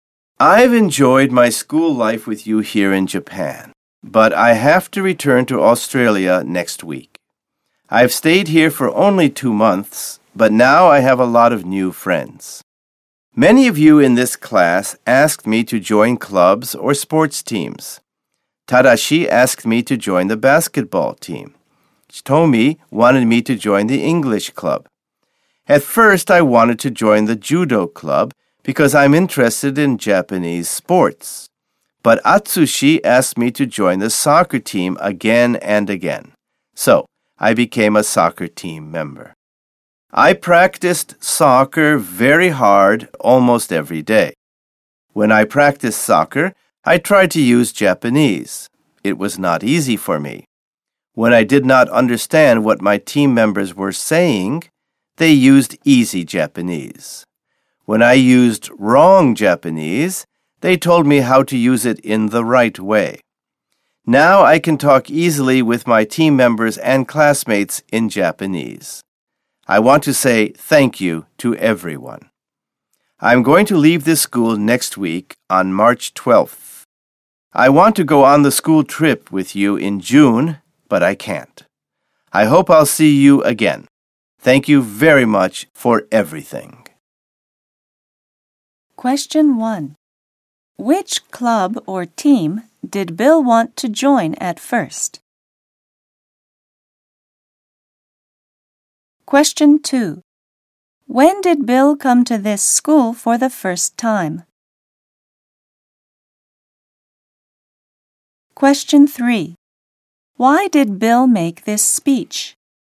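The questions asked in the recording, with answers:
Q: Which club or team did Bill want to join at first?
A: The judo club

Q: Why did Bill make this speech?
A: To thank everyone and say goodbye because he is returning to Australia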